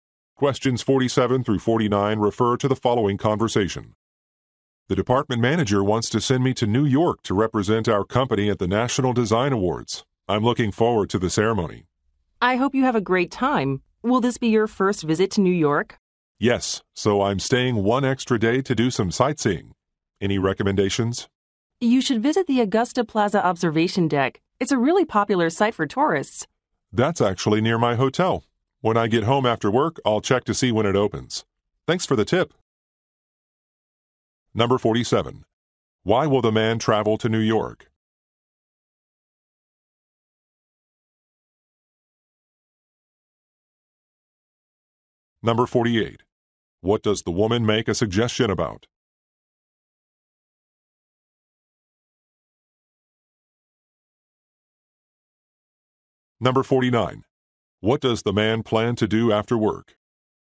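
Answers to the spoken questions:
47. To represent his company at an awards ceremony
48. A tourist site to visit
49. Check the observation deck's opening hours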